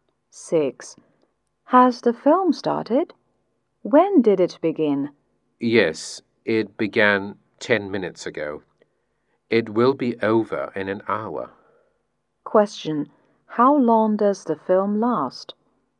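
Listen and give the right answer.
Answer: An hour and ten minutes (70 minutes)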